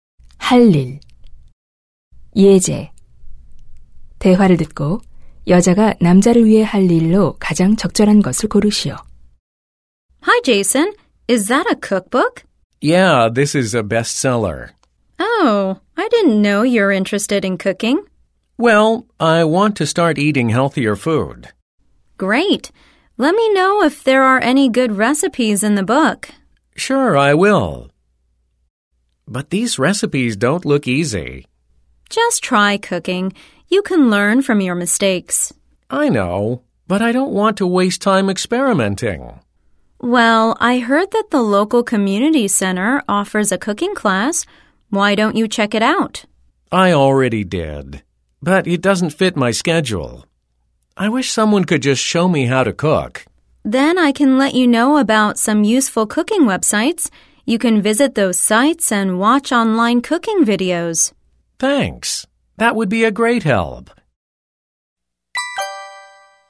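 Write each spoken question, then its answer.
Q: 대화를 듣고 여자가 남자를 위해 할 일로 가장 적절한 것을 고르시오.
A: 유용한 요리 웹사이트 알려주기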